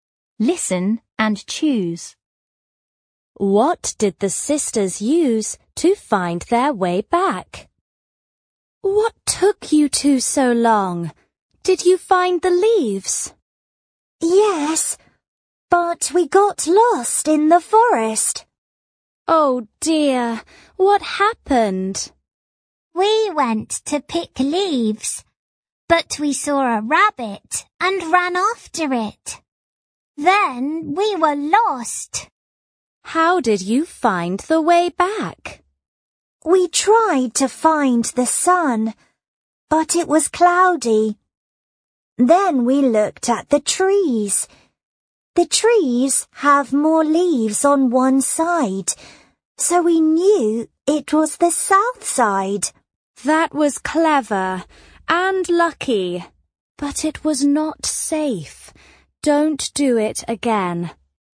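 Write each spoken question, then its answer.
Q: What did the sisters use to find their way back?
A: The trees (more leaves on the south side)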